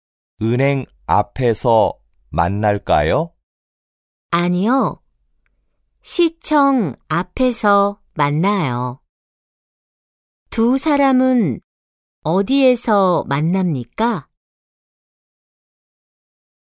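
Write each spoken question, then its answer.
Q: 두 사람은 어디에서 만납니까?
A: 시청 앞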